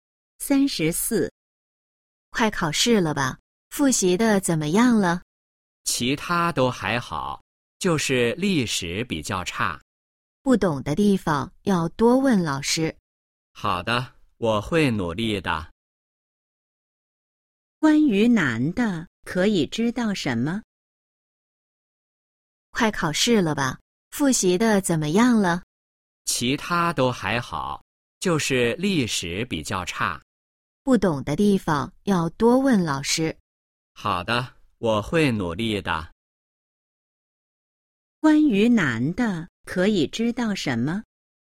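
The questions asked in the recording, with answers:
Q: 关于男的可以知道什么?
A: 历史比较差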